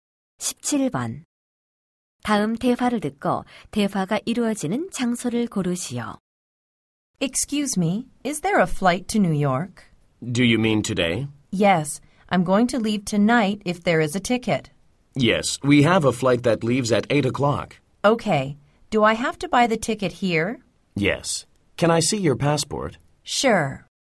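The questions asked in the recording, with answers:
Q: 다음 대화를 듣고 대화가 이루어지는 장소를 고르시오.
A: 공항 (항공권 판매 창구)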